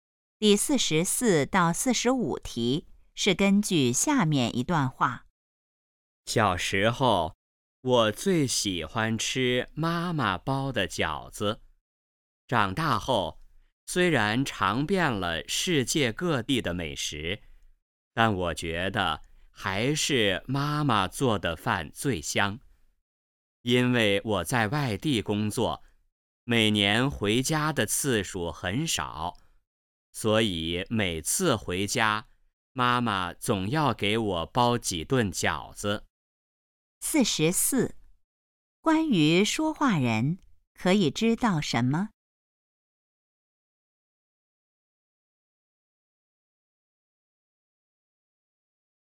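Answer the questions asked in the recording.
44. 最喜欢吃妈妈包的饺子
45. 在外地工作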